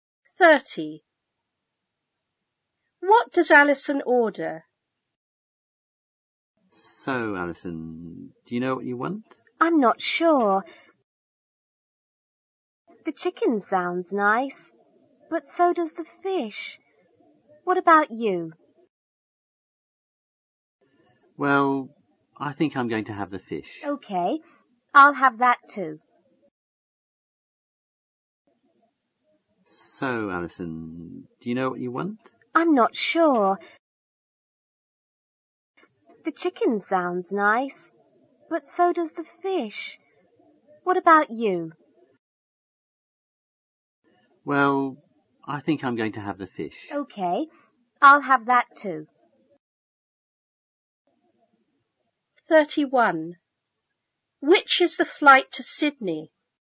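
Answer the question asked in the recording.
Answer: The fish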